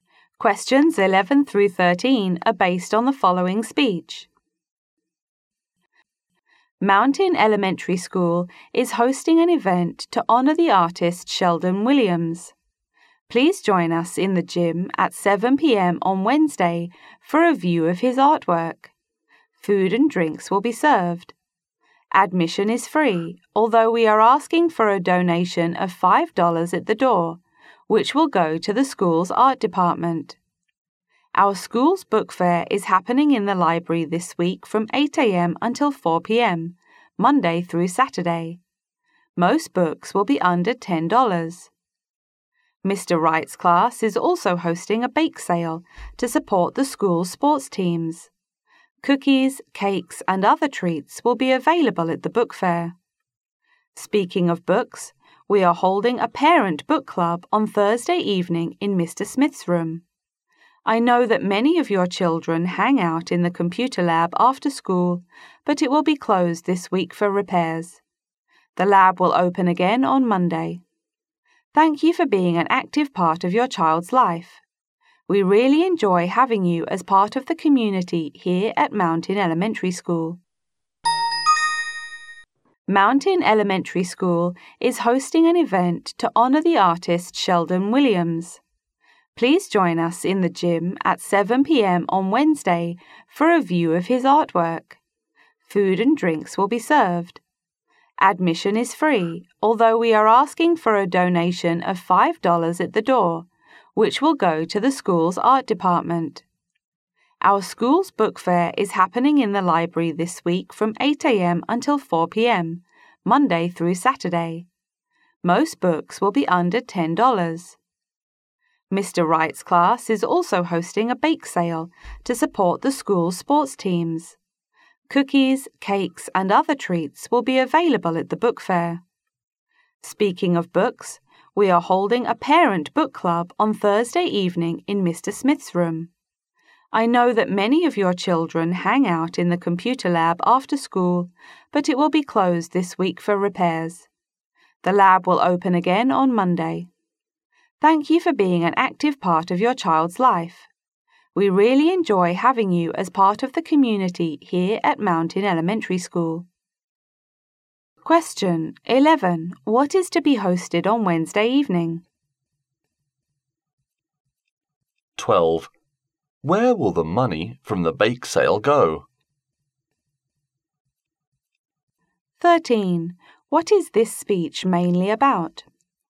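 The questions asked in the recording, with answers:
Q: What is to be hosted on Wednesday evening?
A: An event honouring the artist Sheldon Williams, showing his artwork

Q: Where will the money from the bake sale go?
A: To the school's sports teams

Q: What is this speech mainly about?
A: This week's events at Mountain Elementary School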